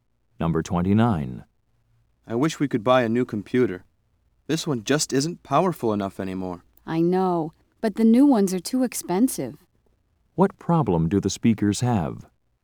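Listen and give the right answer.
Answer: They can't afford a new computer.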